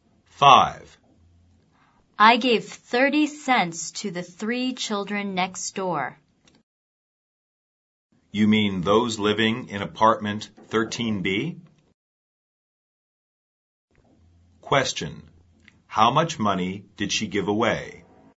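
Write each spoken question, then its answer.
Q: How much money did she give away?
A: 30 cents.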